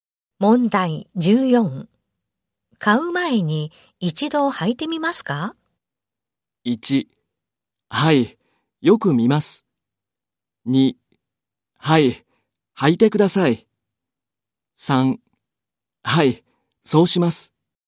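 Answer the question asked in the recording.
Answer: 3: はい、そうします。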